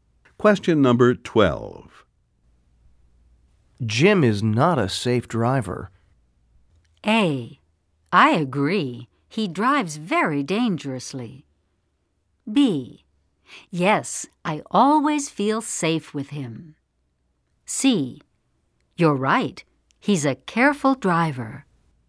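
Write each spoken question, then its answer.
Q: Jim is not a safe driver.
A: A: I agree. He drives very dangerously.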